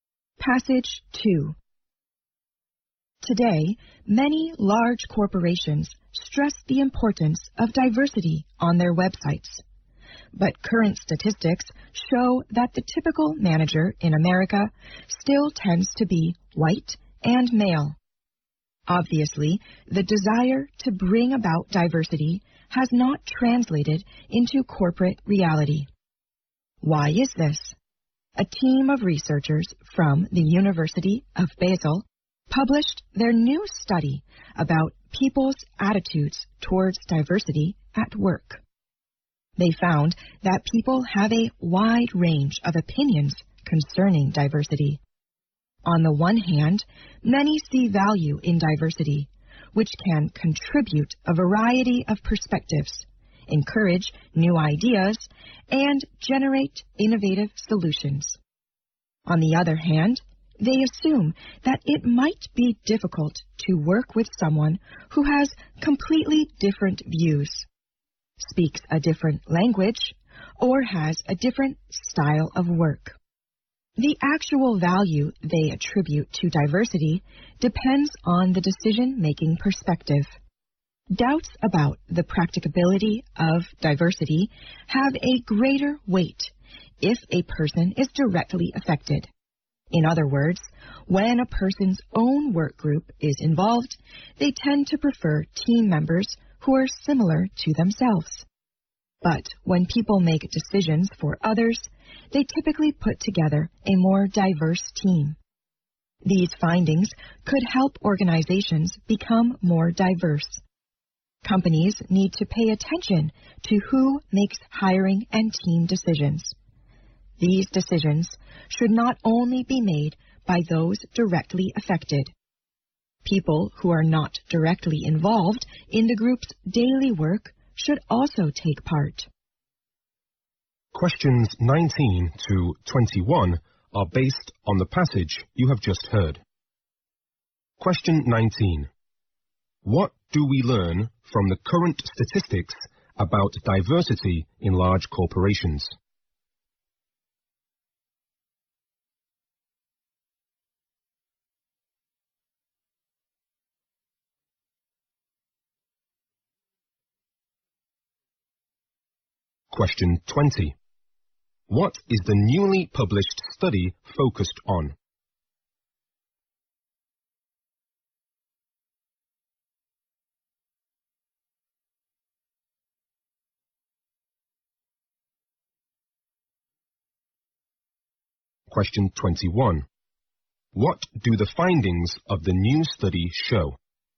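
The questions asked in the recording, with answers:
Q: What do we learn from the current statistics about diversity in large corporations?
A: The typical manager is still white and male, so diversity has not become reality.

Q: What is the newly published study focused on?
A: People's attitudes towards diversity at work.

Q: What do the findings of the new study show?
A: People prefer similar team members for their own group, but choose more diverse teams for others.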